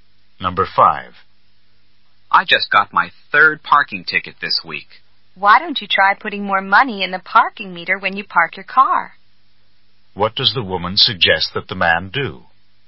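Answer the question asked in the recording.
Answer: Put more money in the parking meter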